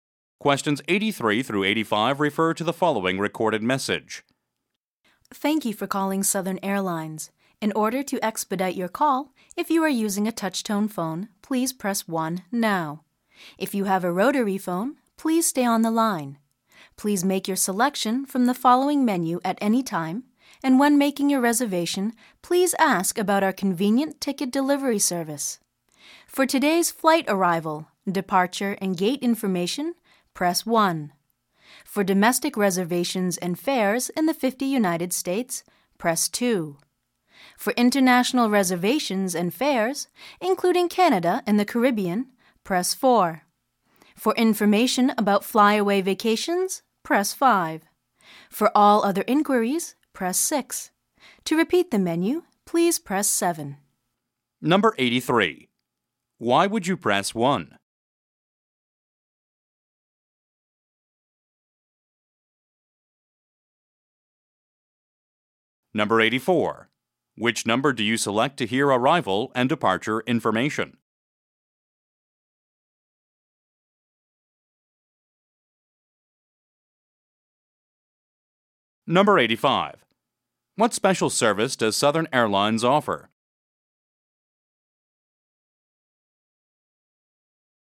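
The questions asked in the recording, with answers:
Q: Why would you press 1?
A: If you are using a touch-tone phone

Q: What special service does Southern Airlines offer?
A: Ticket delivery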